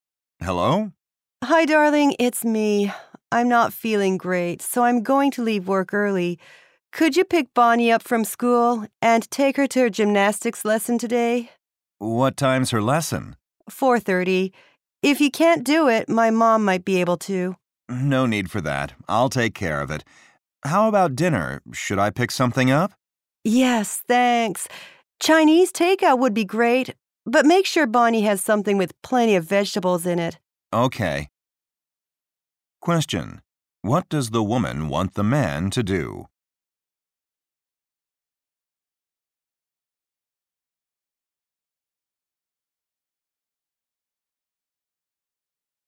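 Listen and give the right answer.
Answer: Pick Bonnie up from school and take her to her gymnastics lesson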